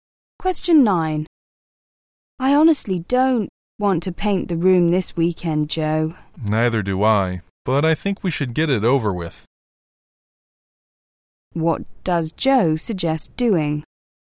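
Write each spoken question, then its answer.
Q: What does Joe suggest doing?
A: Painting the room this weekend anyway.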